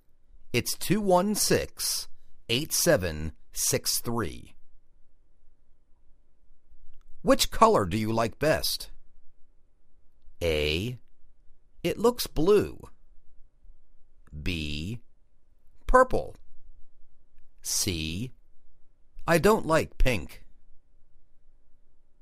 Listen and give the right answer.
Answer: Purple